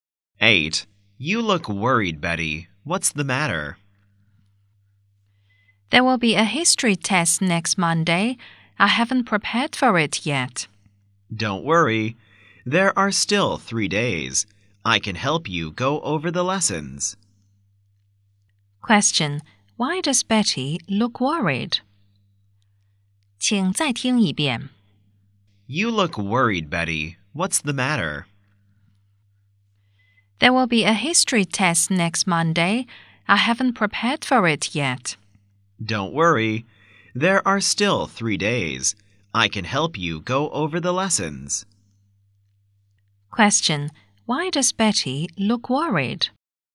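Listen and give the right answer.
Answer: She has a history test next Monday and hasn't prepared for it.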